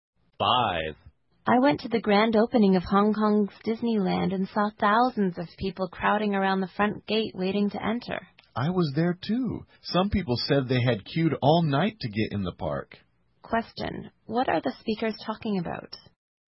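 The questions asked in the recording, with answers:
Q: What are the speakers talking about?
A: The grand opening of Hong Kong Disneyland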